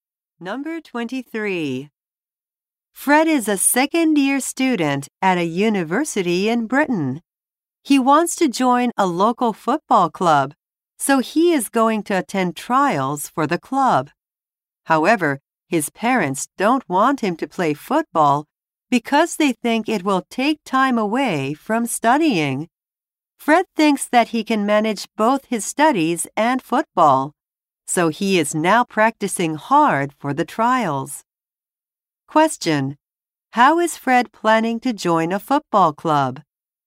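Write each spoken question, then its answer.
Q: How is Fred planning to join a football club?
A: By attending trials for the club.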